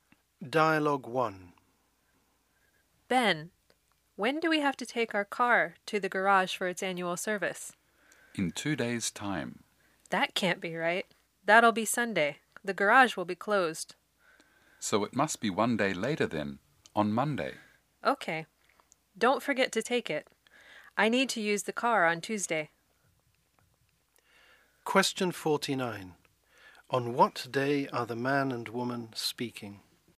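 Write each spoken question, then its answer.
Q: On what day are the man and woman speaking?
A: Friday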